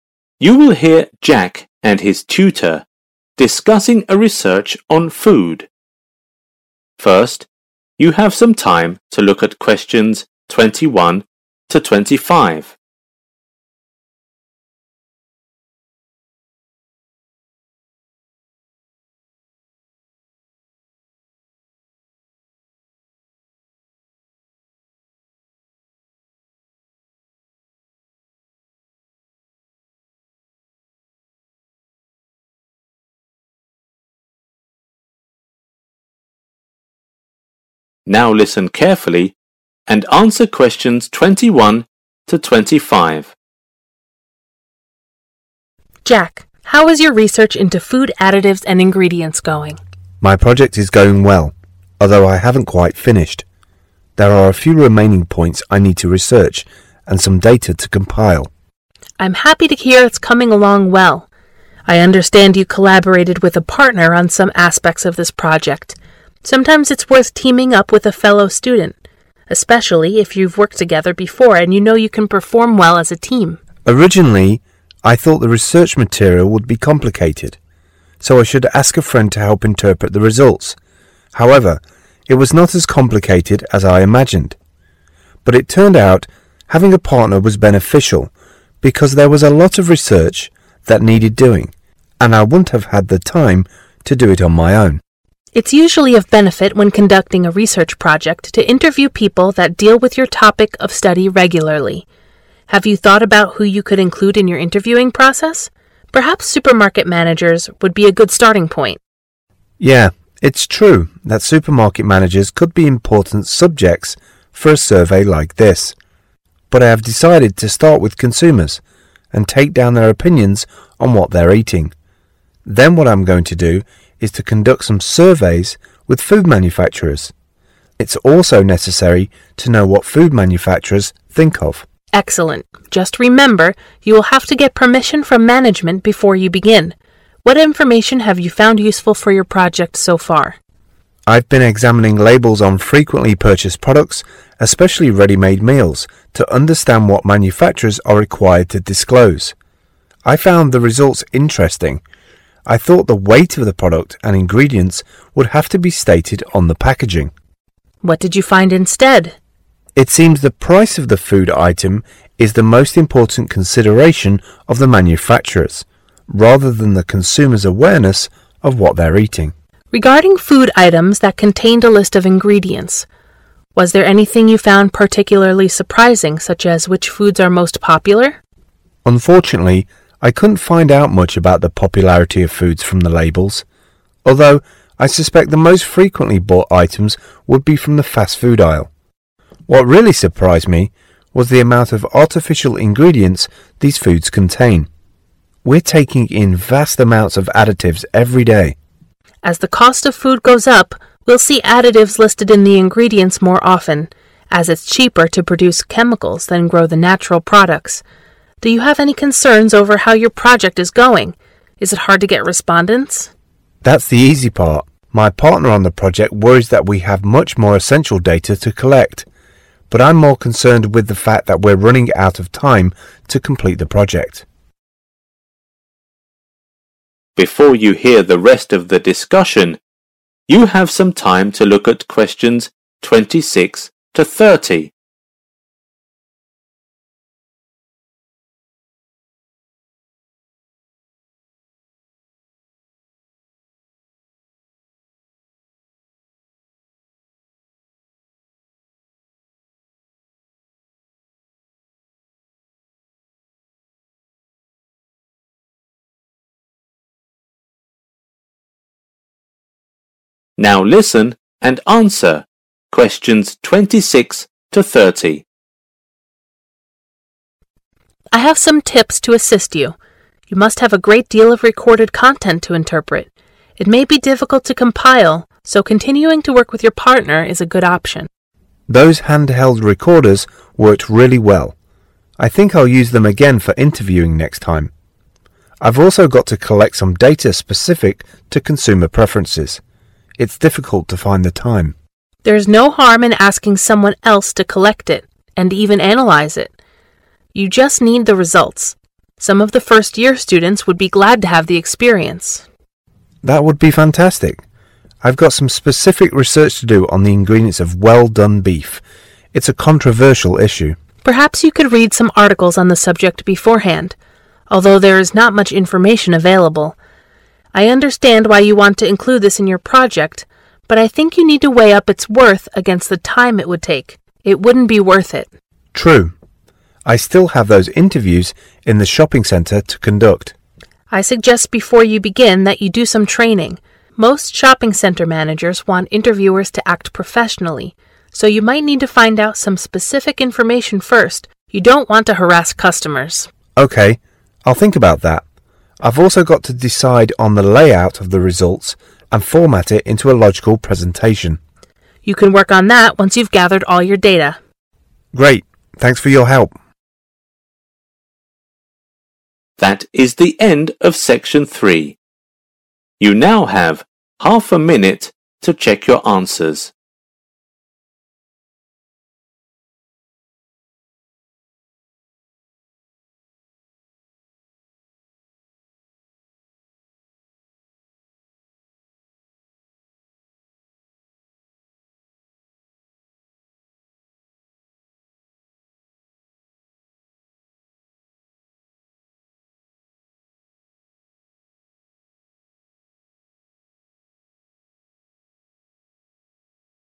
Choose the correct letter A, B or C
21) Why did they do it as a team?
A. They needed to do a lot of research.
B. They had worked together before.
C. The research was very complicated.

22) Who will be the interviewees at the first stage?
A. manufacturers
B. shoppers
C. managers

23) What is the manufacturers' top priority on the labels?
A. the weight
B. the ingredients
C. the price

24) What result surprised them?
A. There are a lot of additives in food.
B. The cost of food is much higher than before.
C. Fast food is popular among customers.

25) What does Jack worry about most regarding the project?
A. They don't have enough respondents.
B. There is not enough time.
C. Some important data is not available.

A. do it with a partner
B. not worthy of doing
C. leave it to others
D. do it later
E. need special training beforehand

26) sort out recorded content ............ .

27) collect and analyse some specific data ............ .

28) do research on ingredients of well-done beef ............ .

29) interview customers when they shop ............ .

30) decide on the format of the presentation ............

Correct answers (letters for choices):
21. A
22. B
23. C
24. A
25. B
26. A
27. C
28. B
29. E
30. D